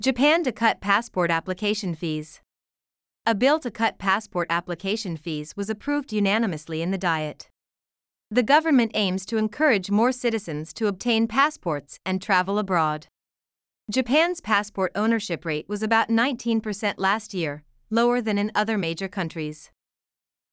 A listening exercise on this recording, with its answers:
次の各英文の内容が本文の説明と合っていたら"True"、違っていたら"False" を選んでください。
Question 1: The government wants more citizens to obtain passports.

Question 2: Japan's passport ownership rate used to be much lower than now.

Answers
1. True
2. False

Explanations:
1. 2番目のセンテンスで、「政府は、より多くの国民にパスポートを取得させ、海外渡航を促したいと考えている。」と述べています。設問の内容と一致するため、解答はTrue となります。
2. 3番目のセンテンスで、「日本のパスポート保有率は昨年およそ19%で、他の主要国より低い水準にとどまっている。」と述べています。「以前のパスポート保有率」についての説明はないため、解答はFalse となります。

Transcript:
Japan to Cut Passport Application Fees
A bill to cut passport application fees was approved unanimously in the Diet.
The government aims to encourage more citizens to obtain passports and travel abroad.
Japan's passport ownership rate was about 19 percent last year, lower than in other major countries.